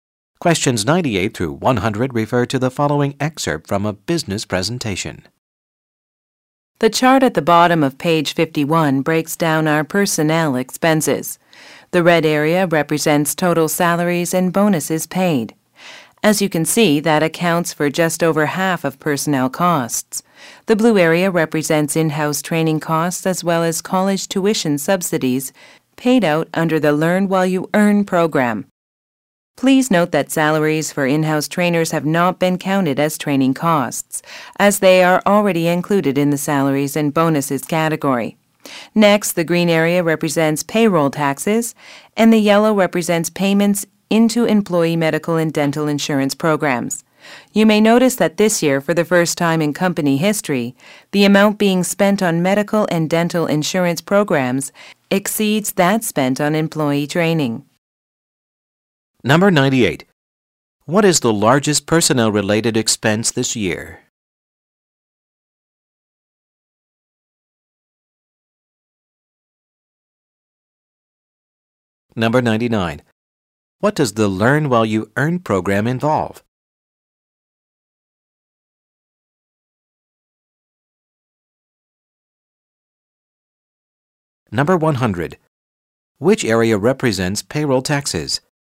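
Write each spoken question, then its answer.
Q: What is the largest personnel-related expense this year?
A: Salaries and bonuses

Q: What does the Learn While You Earn program involve?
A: College tuition subsidies

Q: Which area represents payroll taxes?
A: The green area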